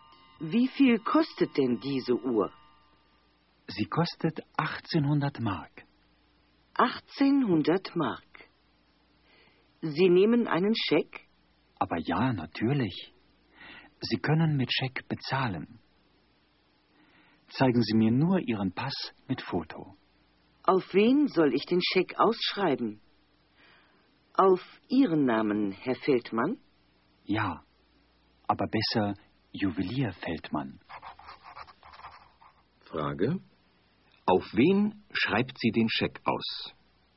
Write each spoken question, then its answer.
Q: Auf wen schreibt sie den Scheck aus?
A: Sie schreibt ihn auf Juwelier Feldmann aus.